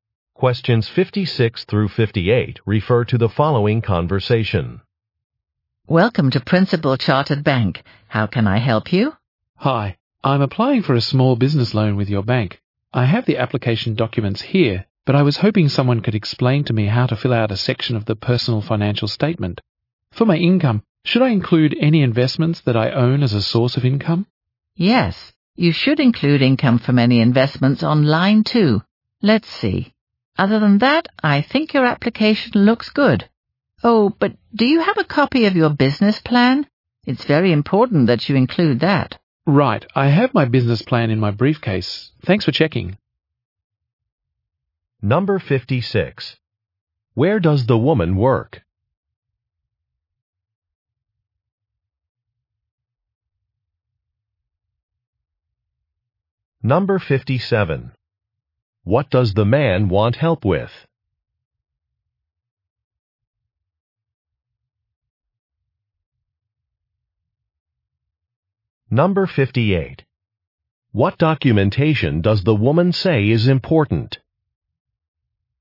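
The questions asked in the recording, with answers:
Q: Where does the woman work?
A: At a bank

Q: What does the man want help with?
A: Filling out part of a loan application

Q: What documentation does the woman say is important?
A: A business plan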